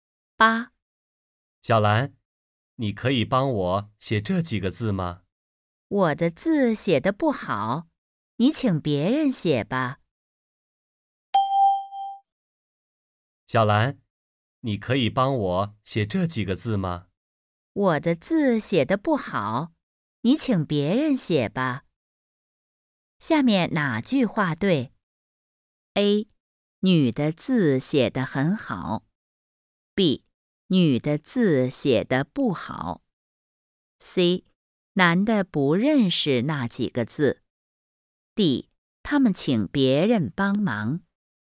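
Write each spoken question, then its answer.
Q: 下面哪句话对?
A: B: 女的字写得不好。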